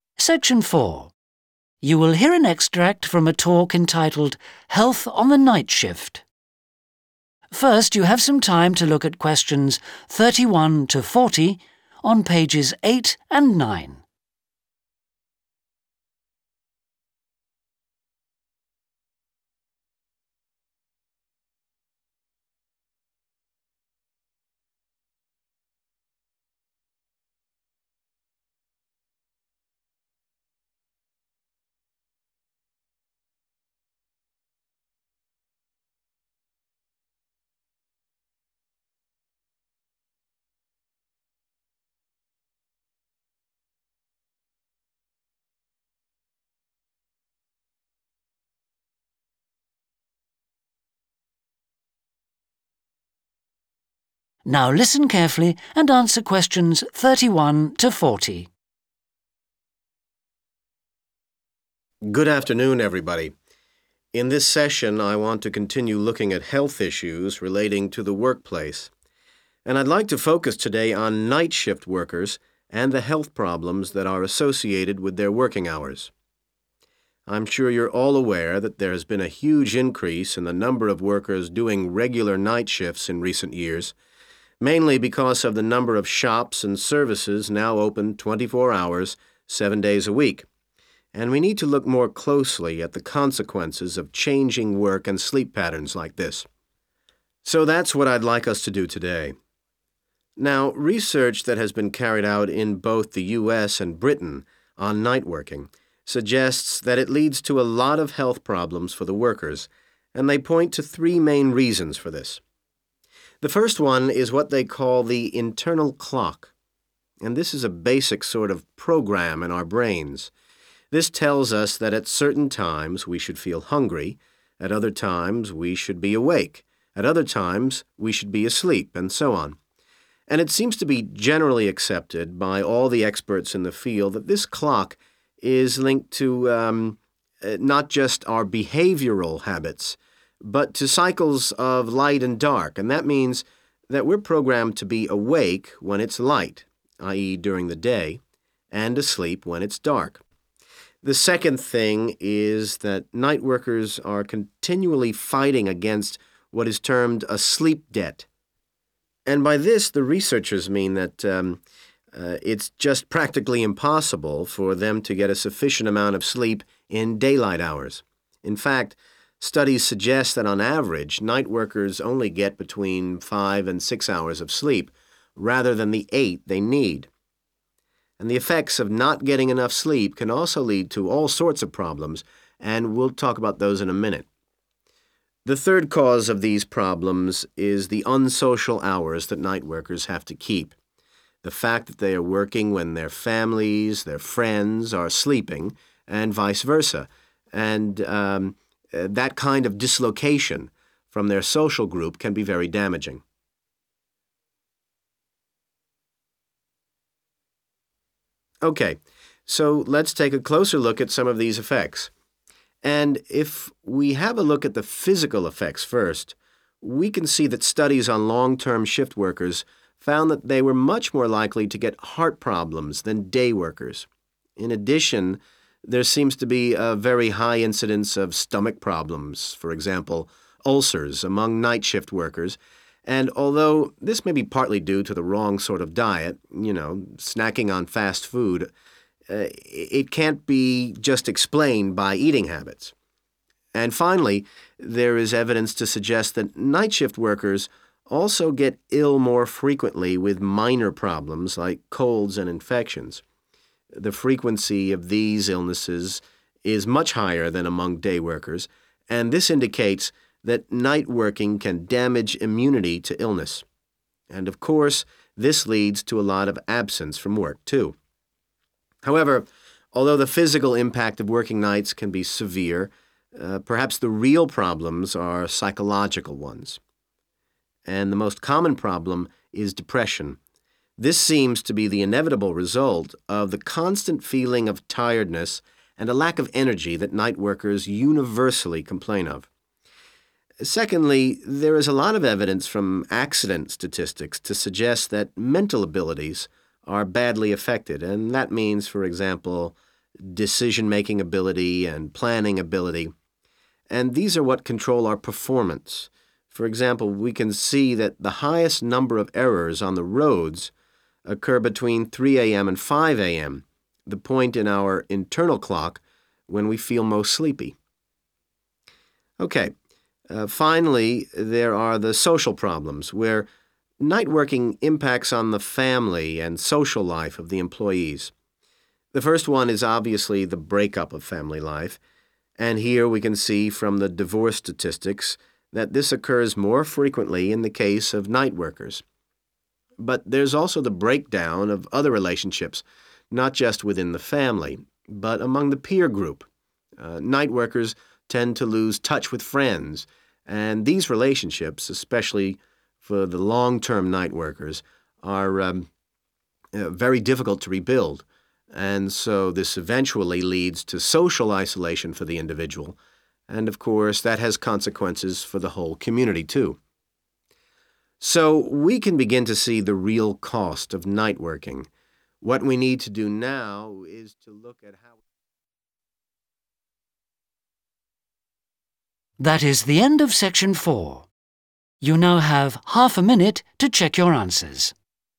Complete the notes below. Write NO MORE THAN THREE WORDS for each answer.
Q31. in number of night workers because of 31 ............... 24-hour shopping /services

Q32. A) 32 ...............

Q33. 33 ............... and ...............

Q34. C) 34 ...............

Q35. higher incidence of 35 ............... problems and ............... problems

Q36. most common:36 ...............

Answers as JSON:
{"31": "Health increase", "32": "Internal clock", "33": "Light dark", "34": "Unsocial hours", "35": "Heart stomach", "36": "Depression"}

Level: SECTION 4